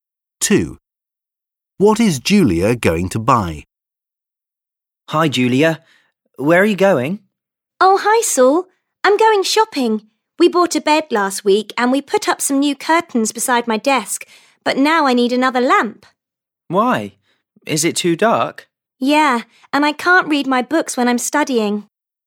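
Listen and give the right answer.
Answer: a lamp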